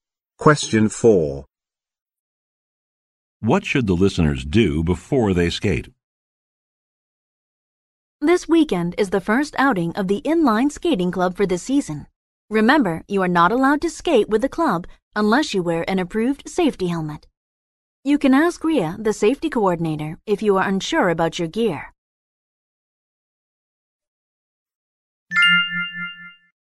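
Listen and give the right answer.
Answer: Wear an approved safety helmet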